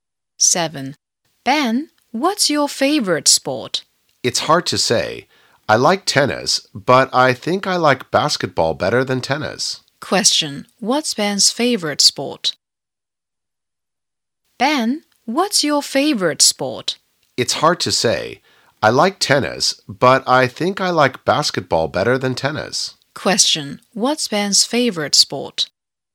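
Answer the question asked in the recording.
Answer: Basketball.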